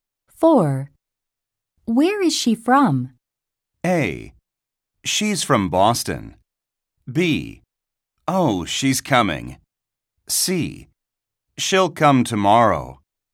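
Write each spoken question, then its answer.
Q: Where is she from?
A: A: She's from Boston.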